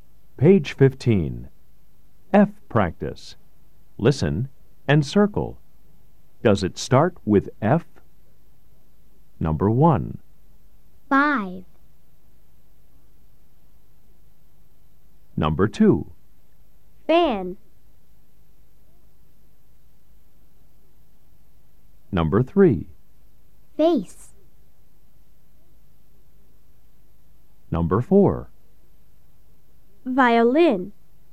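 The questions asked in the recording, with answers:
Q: Does it start with F? Number 1. 5.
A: Yes

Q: Face.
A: Yes

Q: Violin.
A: No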